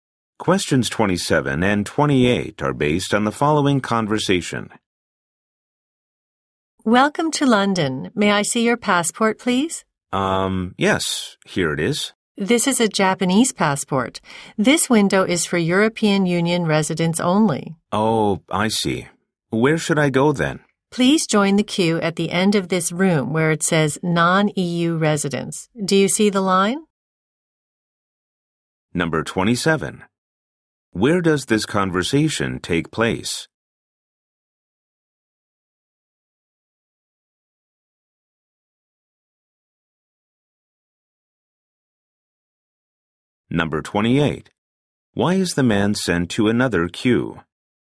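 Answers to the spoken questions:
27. At passport control in a London airport.
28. He has a Japanese passport and the window is for EU residents only.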